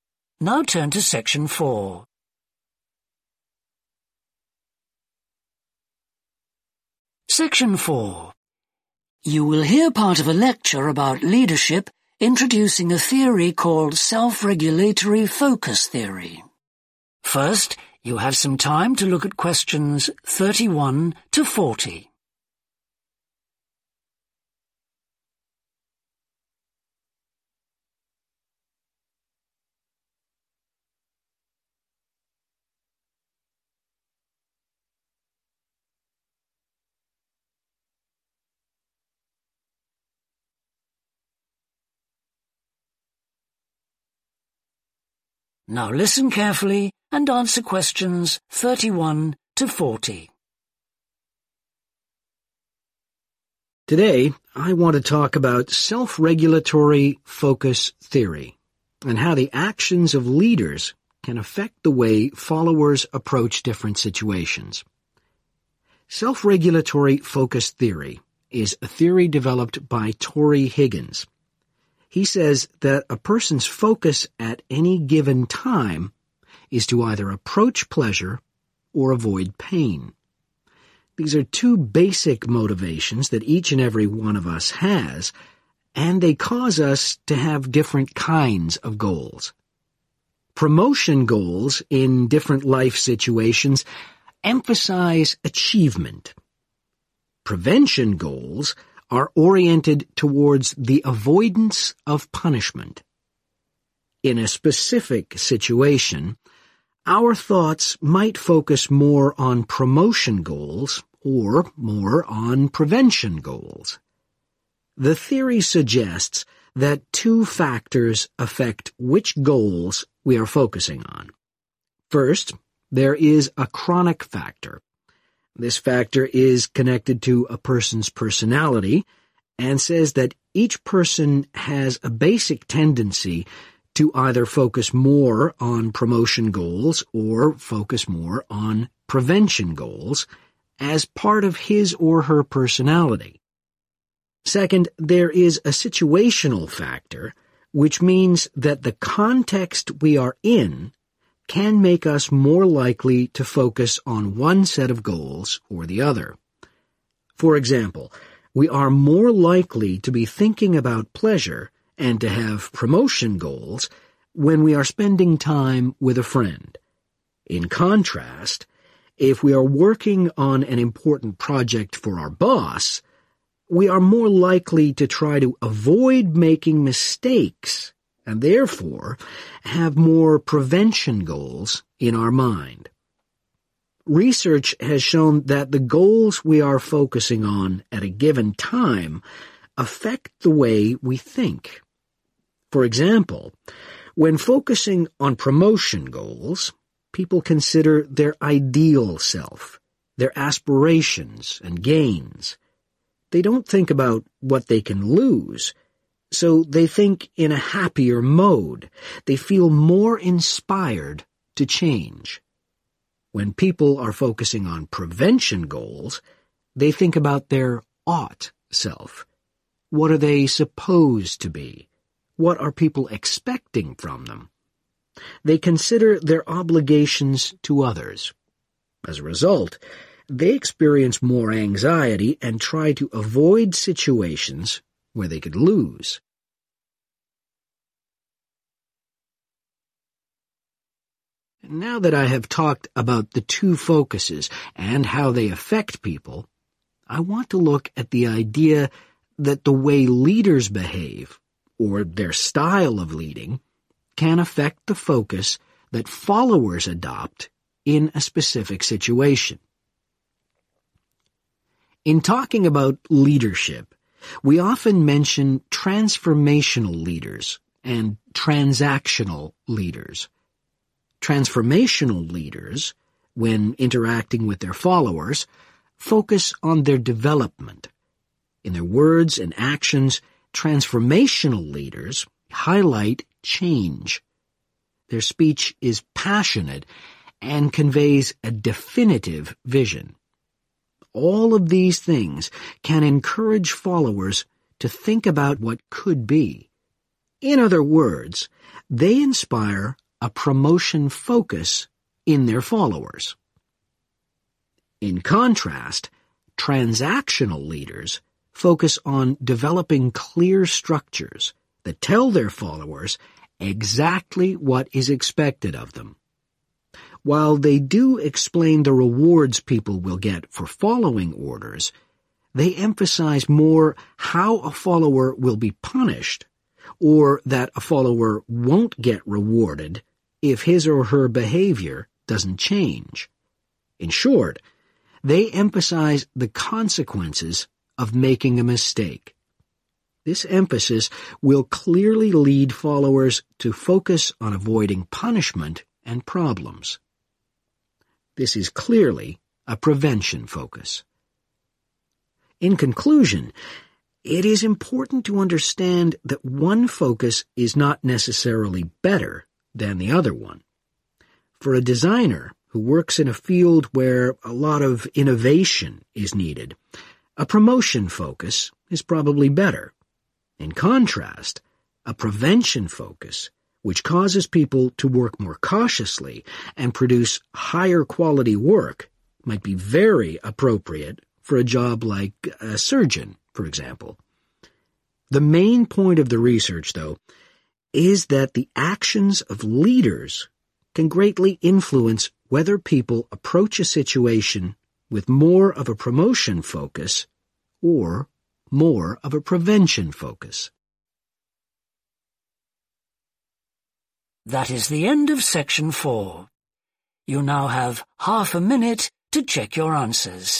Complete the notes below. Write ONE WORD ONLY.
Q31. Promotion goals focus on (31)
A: achievements

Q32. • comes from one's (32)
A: personality

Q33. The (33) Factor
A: situational

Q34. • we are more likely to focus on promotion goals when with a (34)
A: friend

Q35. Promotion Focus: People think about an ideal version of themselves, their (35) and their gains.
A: aspirations

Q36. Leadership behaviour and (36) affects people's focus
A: style

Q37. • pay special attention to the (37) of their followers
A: development

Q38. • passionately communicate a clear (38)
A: vision

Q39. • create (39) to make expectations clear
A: structures

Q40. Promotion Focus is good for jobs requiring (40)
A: innovations